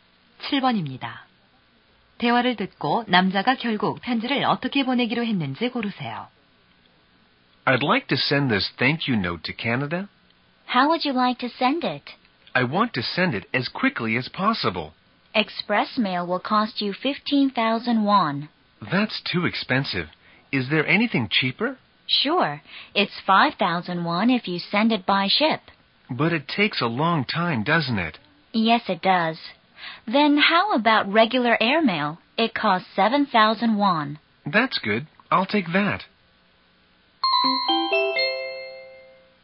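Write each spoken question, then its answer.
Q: 대화를 듣고 남자가 결국 편지를 어떻게 보내기로 했는지 고르세요.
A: 일반 항공우편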